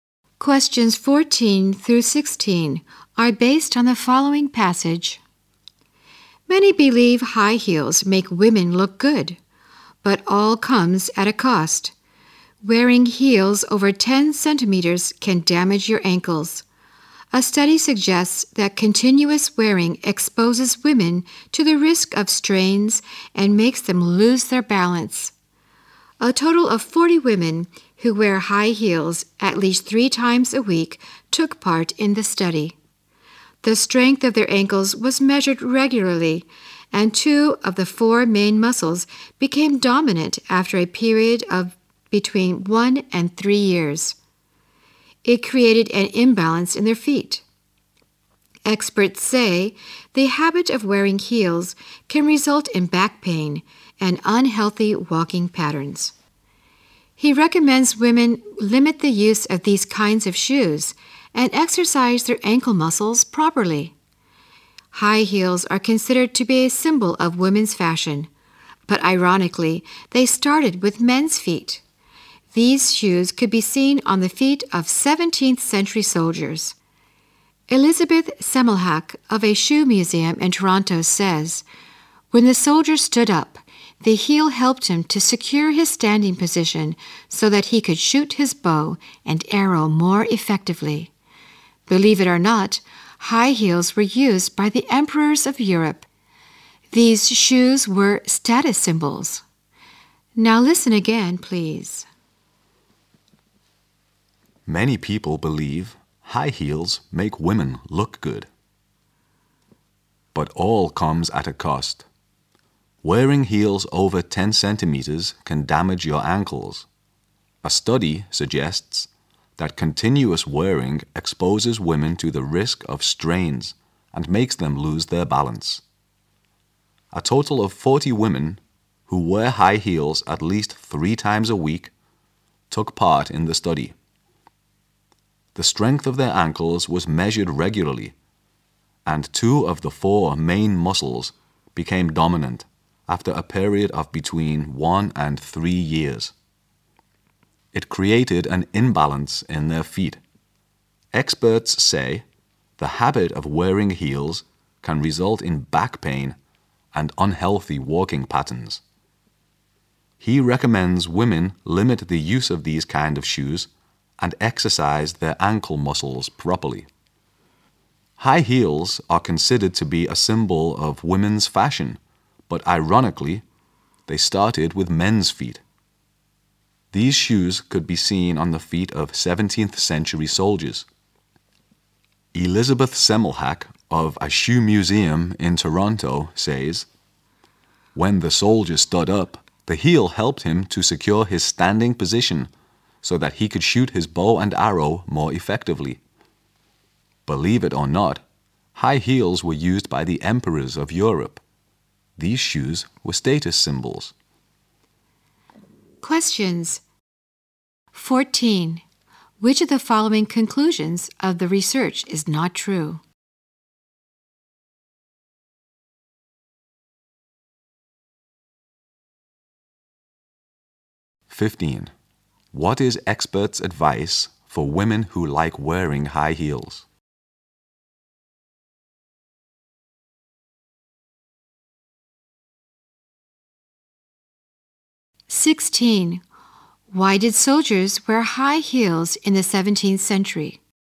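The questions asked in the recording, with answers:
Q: What is experts' advice for women who like wearing high heels?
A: Limit wearing them and exercise their ankle muscles properly

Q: Why did soldiers wear high heels in the 17th century?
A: To secure their standing position so they could shoot arrows more effectively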